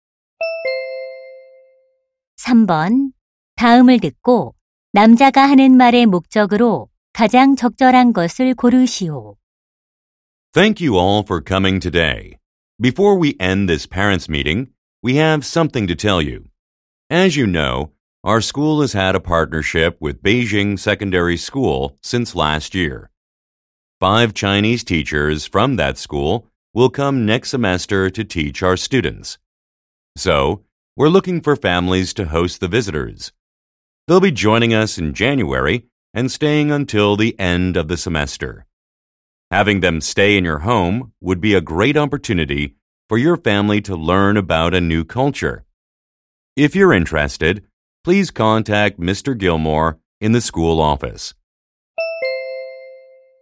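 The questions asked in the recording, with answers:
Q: 다음을 듣고 남자가 하는 말의 목적으로 가장 적절한 것을 고르시오.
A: 방문 중국인 교사들을 머물게 할 홈스테이 가정 모집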